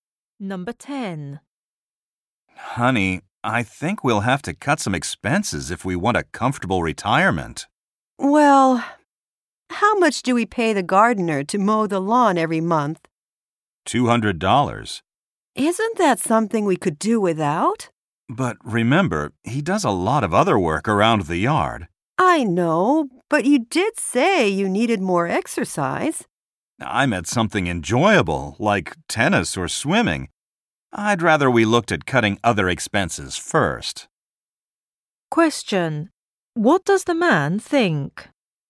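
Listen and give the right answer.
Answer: They should cut other expenses before letting the gardener go.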